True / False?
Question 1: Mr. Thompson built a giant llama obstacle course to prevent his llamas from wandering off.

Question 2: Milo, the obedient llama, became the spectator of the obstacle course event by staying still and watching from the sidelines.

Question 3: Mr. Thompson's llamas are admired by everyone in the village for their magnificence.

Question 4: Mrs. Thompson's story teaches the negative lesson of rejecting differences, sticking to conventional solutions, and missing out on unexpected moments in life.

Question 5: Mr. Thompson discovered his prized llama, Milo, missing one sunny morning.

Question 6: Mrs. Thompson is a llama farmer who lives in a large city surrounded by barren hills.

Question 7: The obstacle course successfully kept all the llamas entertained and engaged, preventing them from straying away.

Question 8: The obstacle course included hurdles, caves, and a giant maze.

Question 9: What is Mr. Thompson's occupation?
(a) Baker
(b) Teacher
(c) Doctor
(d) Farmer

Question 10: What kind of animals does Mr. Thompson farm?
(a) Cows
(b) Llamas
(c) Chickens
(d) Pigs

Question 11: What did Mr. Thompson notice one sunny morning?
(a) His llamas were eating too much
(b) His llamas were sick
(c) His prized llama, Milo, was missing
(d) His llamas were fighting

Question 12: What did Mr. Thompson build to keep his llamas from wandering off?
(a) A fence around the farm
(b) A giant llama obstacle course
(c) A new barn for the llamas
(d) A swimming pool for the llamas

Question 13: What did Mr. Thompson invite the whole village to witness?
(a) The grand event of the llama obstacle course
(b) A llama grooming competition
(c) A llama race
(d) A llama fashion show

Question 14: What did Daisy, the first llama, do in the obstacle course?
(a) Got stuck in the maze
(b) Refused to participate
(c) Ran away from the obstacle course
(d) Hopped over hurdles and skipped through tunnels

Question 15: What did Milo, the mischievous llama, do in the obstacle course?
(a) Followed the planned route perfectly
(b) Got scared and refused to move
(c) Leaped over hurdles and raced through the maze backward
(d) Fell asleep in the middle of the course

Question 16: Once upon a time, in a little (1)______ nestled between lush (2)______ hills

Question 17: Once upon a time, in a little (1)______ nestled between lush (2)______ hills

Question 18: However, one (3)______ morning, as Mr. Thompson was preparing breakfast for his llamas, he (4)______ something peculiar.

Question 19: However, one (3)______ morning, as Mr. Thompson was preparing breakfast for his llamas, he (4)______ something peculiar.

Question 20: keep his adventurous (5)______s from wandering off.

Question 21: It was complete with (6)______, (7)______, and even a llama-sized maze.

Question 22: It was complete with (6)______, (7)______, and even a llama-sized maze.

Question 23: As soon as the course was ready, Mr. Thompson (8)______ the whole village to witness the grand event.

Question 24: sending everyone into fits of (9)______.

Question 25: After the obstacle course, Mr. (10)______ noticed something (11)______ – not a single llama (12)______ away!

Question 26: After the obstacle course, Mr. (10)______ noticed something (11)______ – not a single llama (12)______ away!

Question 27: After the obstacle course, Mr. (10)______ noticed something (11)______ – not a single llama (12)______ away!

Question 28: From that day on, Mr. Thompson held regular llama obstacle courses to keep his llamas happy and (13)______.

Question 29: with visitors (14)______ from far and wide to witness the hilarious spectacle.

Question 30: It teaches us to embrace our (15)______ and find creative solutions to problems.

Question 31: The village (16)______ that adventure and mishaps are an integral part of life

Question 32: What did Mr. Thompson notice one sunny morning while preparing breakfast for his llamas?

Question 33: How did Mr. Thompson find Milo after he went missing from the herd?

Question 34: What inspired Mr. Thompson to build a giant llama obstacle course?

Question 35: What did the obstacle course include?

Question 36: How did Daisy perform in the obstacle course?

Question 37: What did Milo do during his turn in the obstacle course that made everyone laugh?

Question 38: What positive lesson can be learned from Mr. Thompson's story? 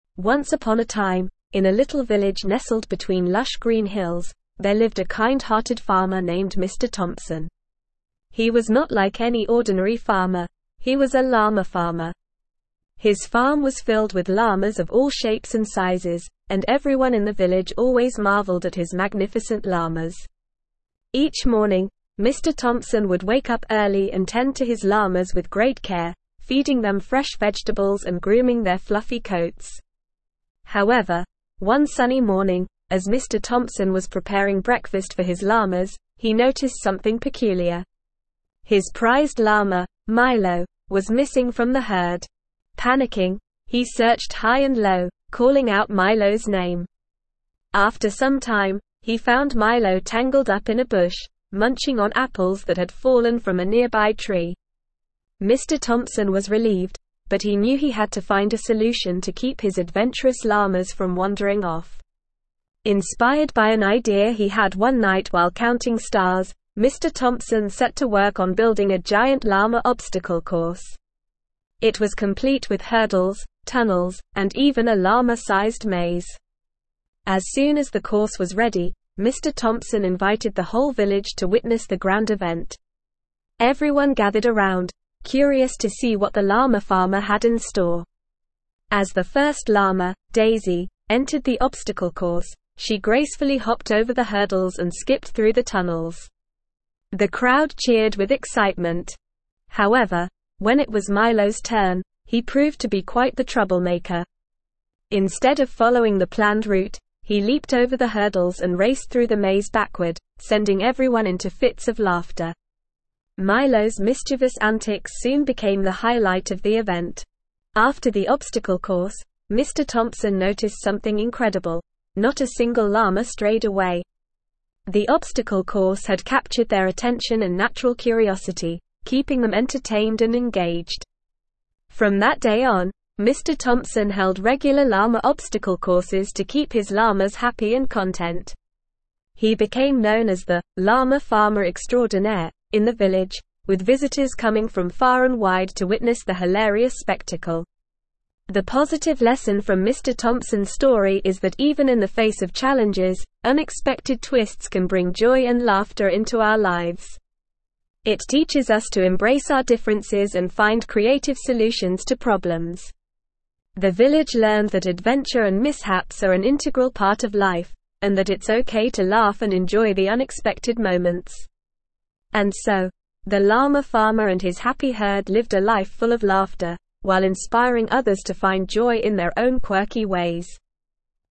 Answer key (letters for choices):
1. True
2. False
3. True
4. False
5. True
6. False
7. True
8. False
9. d
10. b
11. c
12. b
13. a
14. d
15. c
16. village
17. green
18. sunny
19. noticed
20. llama
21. hurdles
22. tunnels
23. invited
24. laughter
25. Thompson
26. incredible
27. strayed
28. content
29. coming
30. differences
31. learned
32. Mr. Thompson noticed that his prized llama, Milo, was missing from the herd.
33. Mr. Thompson found Milo tangled up in a bush, munching on fallen apples.
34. Mr. Thompson was inspired by an idea he had one night while counting stars.
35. The obstacle course included hurdles, tunnels, and a llama-sized maze.
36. Daisy performed gracefully, hopping over hurdles and skipping through tunnels.
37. Milo leaped over the hurdles and raced through the maze backward, causing laughter.
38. The positive lesson is that unexpected twists can bring joy and laughter into our lives, and it's okay to embrace our differences and find creative solutions to problems.

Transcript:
Once upon a time, in a little village nestled between lush green hills, there lived a kind-hearted farmer named Mr. Thompson. He was not like any ordinary farmer; he was a llama farmer. His farm was filled with llamas of all shapes and sizes, and everyone in the village always marveled at his magnificent llamas. Each morning, Mr. Thompson would wake up early and tend to his llamas with great care, feeding them fresh vegetables and grooming their fluffy coats.
However, one sunny morning, as Mr. Thompson was preparing breakfast for his llamas, he noticed something peculiar. His prized llama, Milo, was missing from the herd! Panicking, he searched high and low, calling out Milo's name. After some time, he found Milo tangled up in a bush, munching on apples that had fallen from a nearby tree. Mr. Thompson was relieved, but he knew he had to find a solution to keep his adventurous llamas from wandering off.
Inspired by an idea he had one night while counting stars, Mr. Thompson set to work on building a giant llama obstacle course. It was complete with hurdles, tunnels, and even a llama-sized maze. As soon as the course was ready, Mr. Thompson invited the whole village to witness the grand event. Everyone gathered around, curious to see what the llama farmer had in store.
As the first llama, Daisy, entered the obstacle course, she gracefully hopped over the hurdles and skipped through the tunnels. The crowd cheered with excitement. However, when it was Milo's turn, he proved to be quite the troublemaker. Instead of following the planned route, he leaped over the hurdles and raced through the maze backward, sending everyone into fits of laughter. Milo's mischievous antics soon became the highlight of the event.
After the obstacle course, Mr. Thompson noticed something incredible – not a single llama strayed away! The obstacle course had captured their attention and natural curiosity, keeping them entertained and engaged. From that day on, Mr. Thompson held regular llama obstacle courses to keep his llamas happy and content. He became known as the "Llama Farmer Extraordinaire" in the village, with visitors coming from far and wide to witness the hilarious spectacle.
The positive lesson from Mr. Thompson's story is that even in the face of challenges, unexpected twists can bring joy and laughter into our lives. It teaches us to embrace our differences and find creative solutions to problems. The village learned that adventure and mishaps are an integral part of life, and that it's okay to laugh and enjoy the unexpected moments.
And so, the llama farmer and his happy herd lived a life full of laughter, while inspiring others to find joy in their own quirky ways.

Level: Level 4